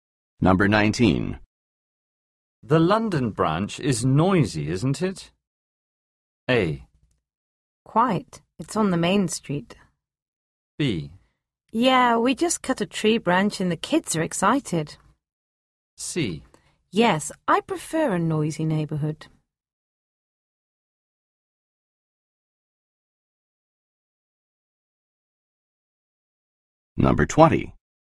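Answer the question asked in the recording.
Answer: A: Quite. It's on the main street.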